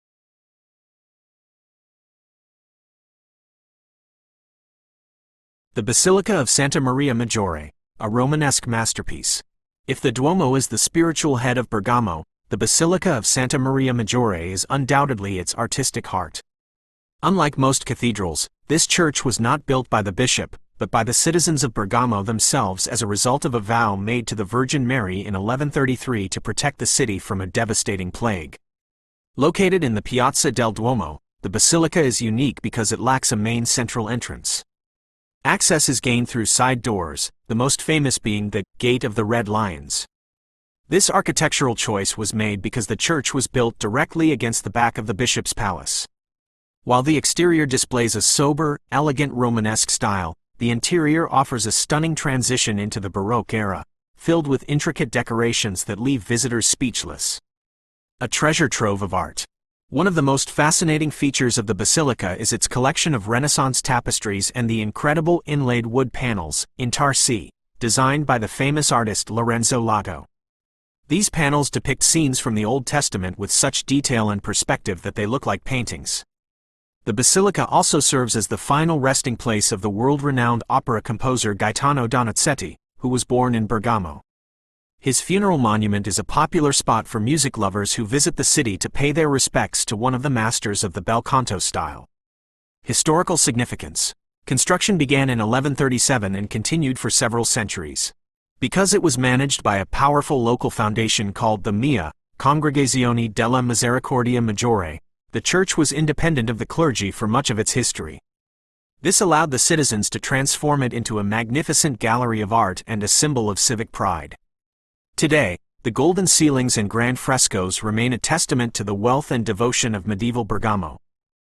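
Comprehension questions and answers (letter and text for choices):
Listen to the recording and mark the correct answers.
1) Why was the Basilica originally built?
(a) To serve as a private chapel for the Bishop.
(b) As a result of a promise made by citizens during a plague.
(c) To house the remains of the opera composer Donizetti.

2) What is unusual about the entrance to the church?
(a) It can only be entered through the Bishop's Palace.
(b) It has no main central door, only side entrances.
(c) It is hidden behind a secret wall in the Piazza.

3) How does the interior differ from the exterior?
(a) The outside is simple Romanesque, while the inside is highly decorated Baroque.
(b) ) The outside is golden and flashy, while the inside is very dark and sober.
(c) Both the inside and outside are in the same Renaissance style.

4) What are the "intarsie" designed by Lorenzo Lotto?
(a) Large statues of red lions located at the gates.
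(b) Elaborate golden frescoes on the high ceilings.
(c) Detailed wood panels showing scenes from the Bible.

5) What does the text say about the foundation known as the MIA?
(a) It was a group of architects who built the "Gate of the Red Lions."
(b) It was the organization that kept the church independent from the clergy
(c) It was the name of the plague that affected Bergamo in 1133.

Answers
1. (b) As a result of a promise made by citizens during a plague.
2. (b) It has no main central door, only side entrances.
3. (a) The outside is simple Romanesque, while the inside is highly decorated Baroque.
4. (c) Detailed wood panels showing scenes from the Bible.
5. (b) It was the organization that kept the church independent from the clergy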